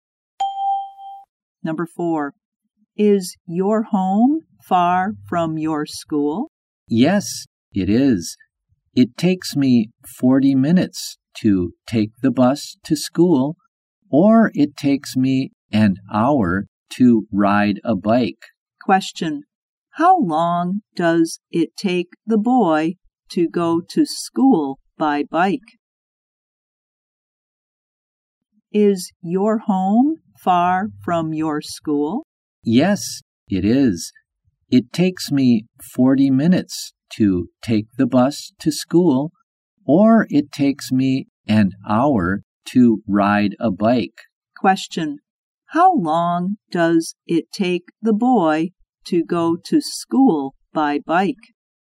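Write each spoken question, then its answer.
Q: How long does it take the boy to go to school by bike?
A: An hour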